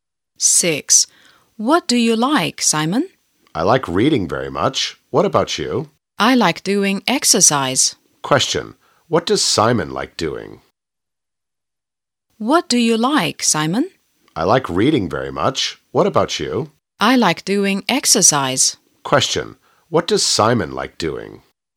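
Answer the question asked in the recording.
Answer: Reading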